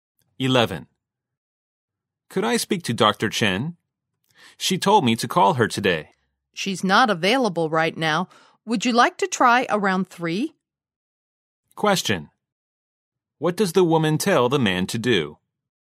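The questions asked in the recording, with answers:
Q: What does the woman tell the man to do?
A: Call again around 3 o'clock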